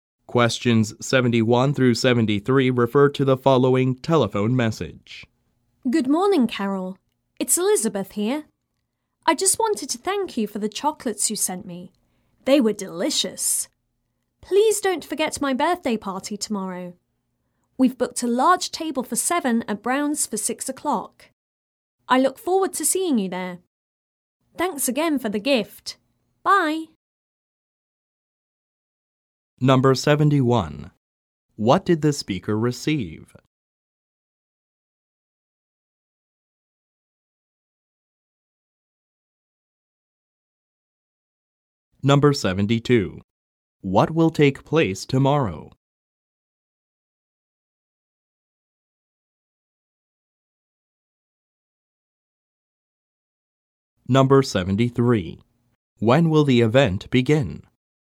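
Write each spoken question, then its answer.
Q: What did the speaker receive?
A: Chocolates

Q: What will take place tomorrow?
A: A birthday party

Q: When will the event begin?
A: At 6 o'clock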